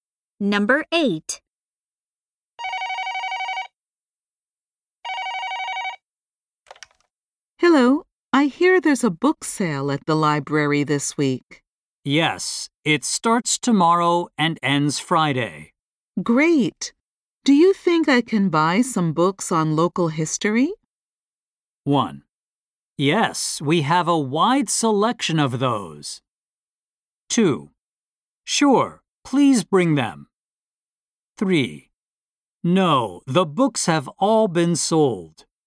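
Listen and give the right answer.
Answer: 1: Yes, we have a wide selection of those.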